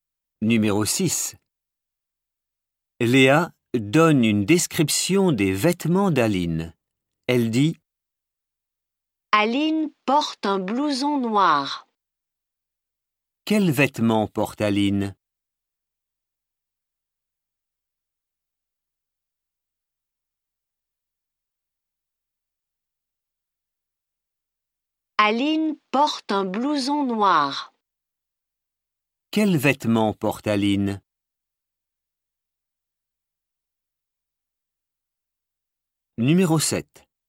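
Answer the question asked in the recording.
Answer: Un blouson noir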